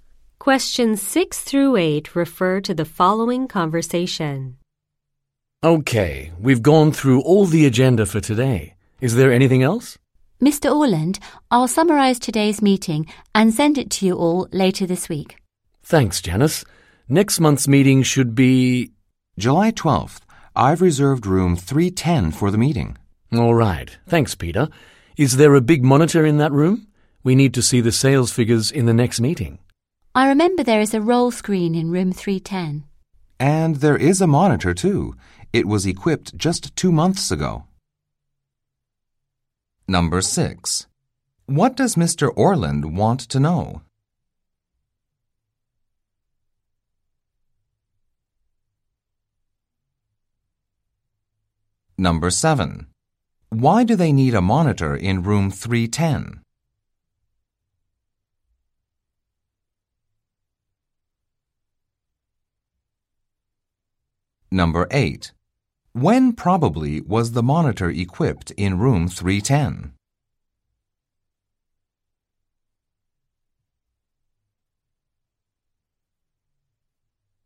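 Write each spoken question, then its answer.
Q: What does Mr. Orland want to know?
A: Whether there is a big monitor in room 310

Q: Why do they need a monitor in room 310?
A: To see the sales figures in the next meeting

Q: When probably was the monitor equipped in room 310?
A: Two months ago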